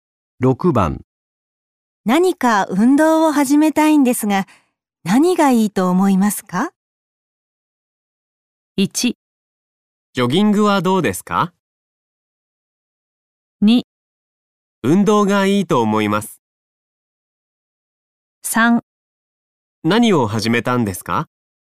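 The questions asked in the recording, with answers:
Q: 何か運動を始めたいんですが、何がいいと思いますか?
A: 1: ジョギングはどうですか?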